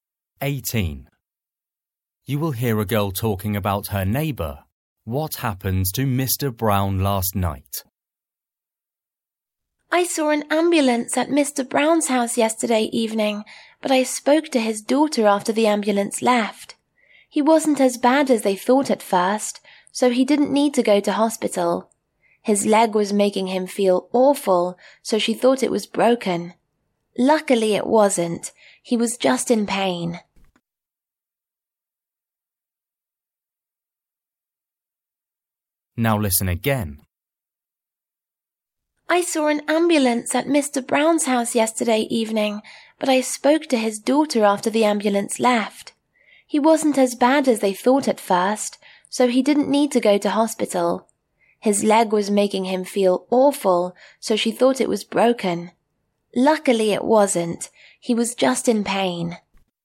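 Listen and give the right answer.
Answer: He hurt his leg, but it wasn't broken and he didn't need to go to hospital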